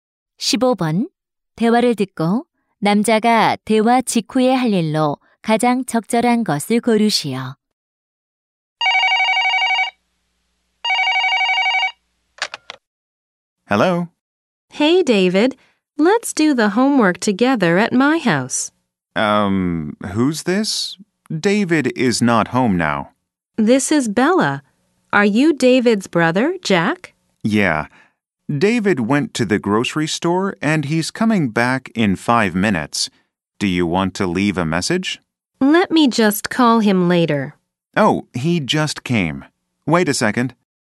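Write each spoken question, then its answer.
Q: 대화를 듣고 남자가 대화 직후에 할 일로 가장 적절한 것을 고르시오.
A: David에게 전화를 바꿔 주기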